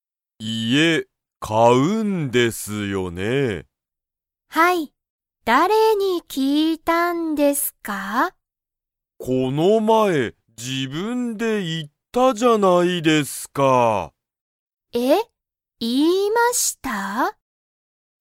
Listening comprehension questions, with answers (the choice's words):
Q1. 田中(たなか)さんは、____を買(か)う。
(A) 部屋(へや)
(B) 誰(だれ)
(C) 自分(じぶん)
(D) 家(いえ)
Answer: 家(いえ)

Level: Level 1